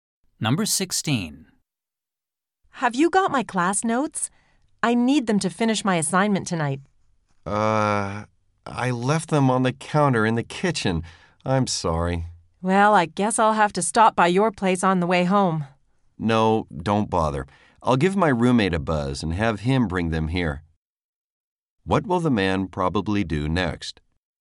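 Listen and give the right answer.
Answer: Call his roommate to bring the notes.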